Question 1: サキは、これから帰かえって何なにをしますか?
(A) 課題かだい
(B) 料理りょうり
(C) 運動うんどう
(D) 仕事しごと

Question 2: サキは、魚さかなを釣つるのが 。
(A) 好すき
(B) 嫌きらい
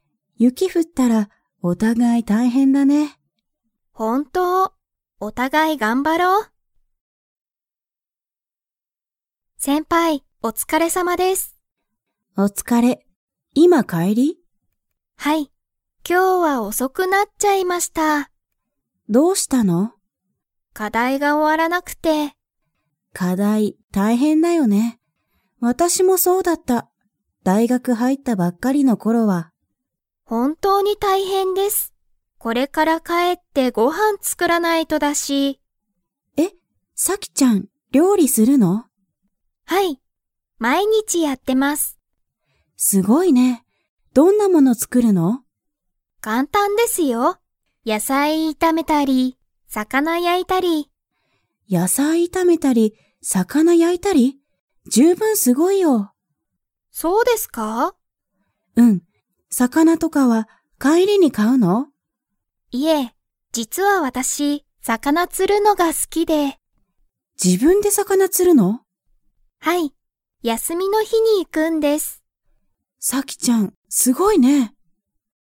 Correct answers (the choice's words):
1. 料理りょうり
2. 好すき

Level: Level 4